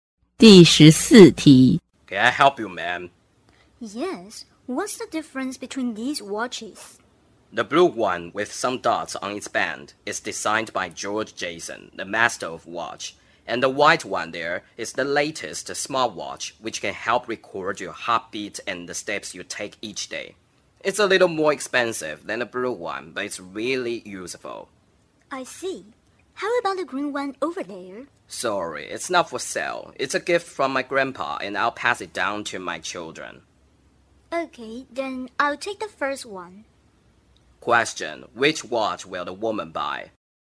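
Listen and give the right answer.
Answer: The blue one with dots on its band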